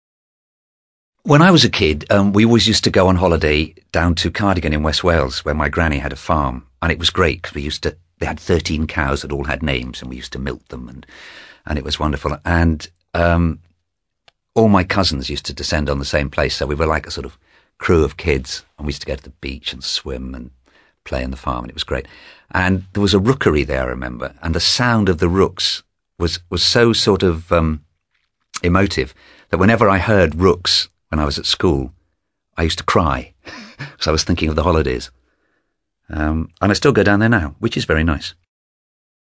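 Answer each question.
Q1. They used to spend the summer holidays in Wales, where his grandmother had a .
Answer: farm

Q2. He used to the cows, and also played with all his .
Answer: milk / cousins

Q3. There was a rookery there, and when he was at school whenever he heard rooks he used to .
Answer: cry

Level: CPE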